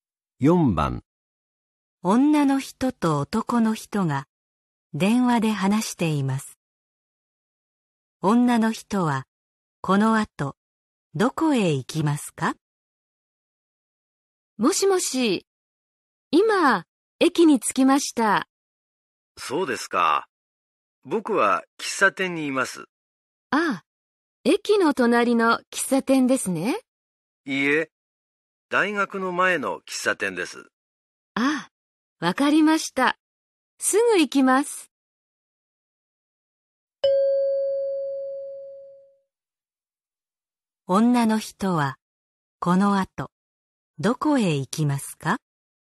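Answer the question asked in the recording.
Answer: 大学の前の喫茶店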